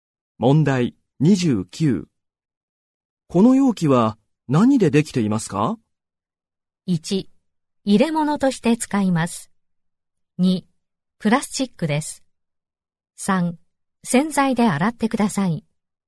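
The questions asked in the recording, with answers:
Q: この容器は何でできていますか?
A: 2: プラスチックです。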